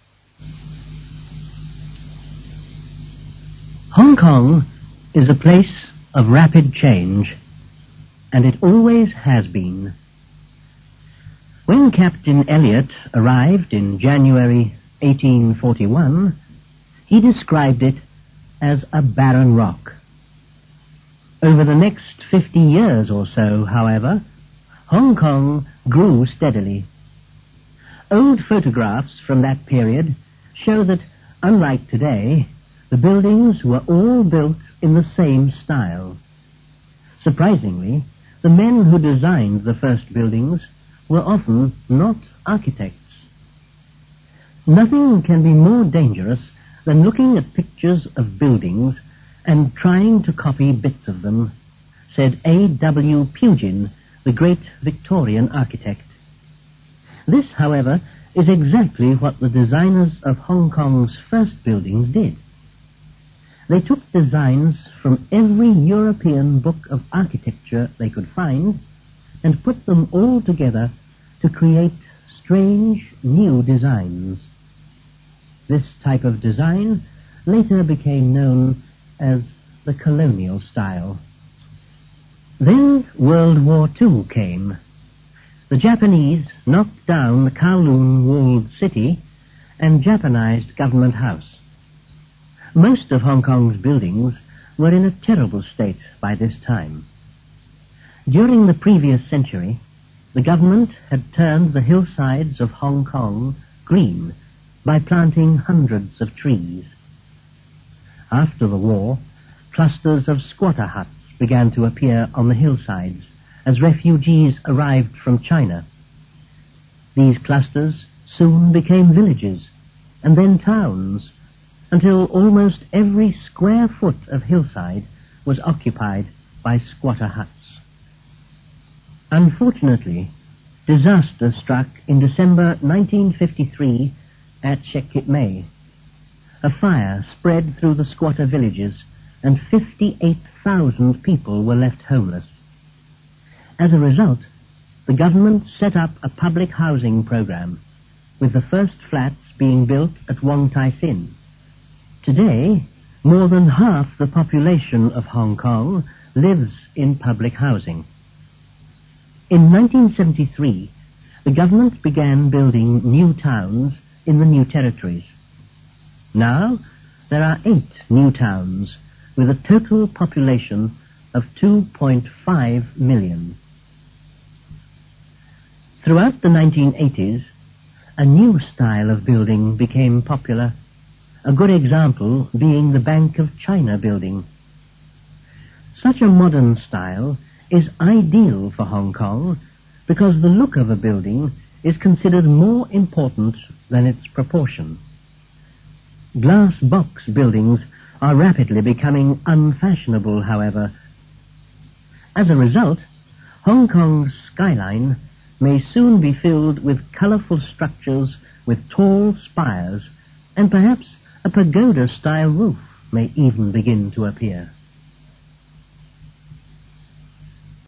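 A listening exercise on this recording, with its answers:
Listen to the text and tick whether each of the following statements is true or false.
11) Captain Elliot found a barren rock in Hong Kong in 1841.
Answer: TRUE

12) Buildings in Hong Kong now have the same styles.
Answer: FALSE

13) These styles were copied from European architecture.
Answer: TRUE

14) New designs for buildings were made by Hong Kong architects.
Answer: FALSE

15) The Japanese changed Hong Kong's buildings during World War II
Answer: TRUE

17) A fire in 1953 killed 58,000 people in Hong Kong.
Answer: FALSE

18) About 15% of Hong Kong people live in public buildings.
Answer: FALSE

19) The bank of China has a new style.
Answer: TRUE

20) "Glass Box" are becoming more popular in Hong Kong.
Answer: FALSE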